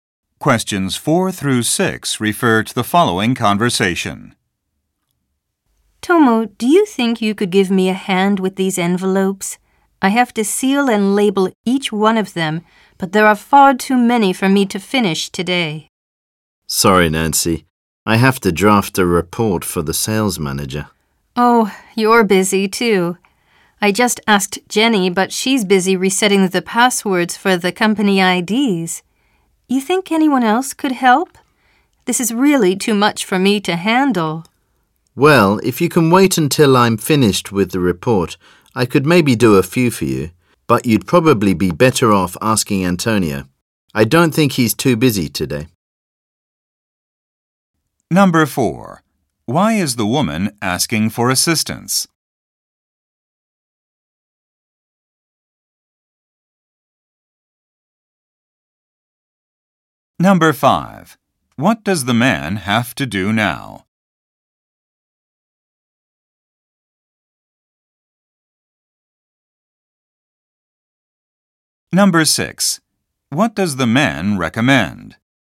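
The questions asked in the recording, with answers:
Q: Why is the woman asking for assistance?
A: She has too many envelopes to seal and label to finish today.

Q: What does the man have to do now?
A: Draft a report for the sales manager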